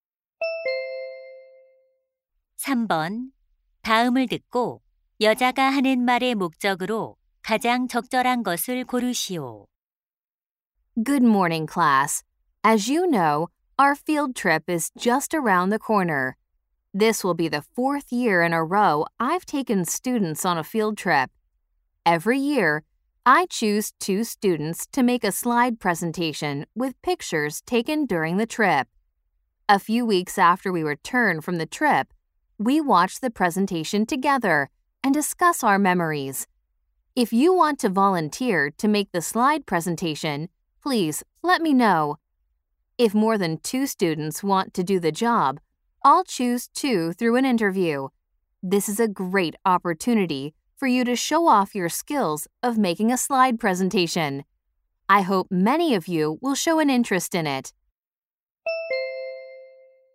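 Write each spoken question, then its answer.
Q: 다음을 듣고 여자가 하는 말의 목적으로 가장 적절한 것을 고르시오.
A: 현장학습 슬라이드 발표 자원자 모집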